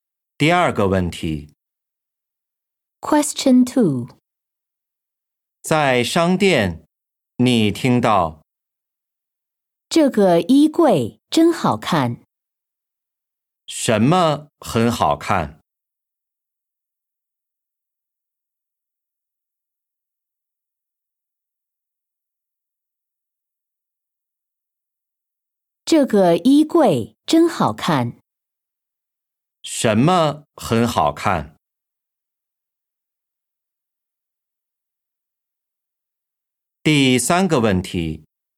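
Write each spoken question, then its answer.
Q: 什么很好看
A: 衣柜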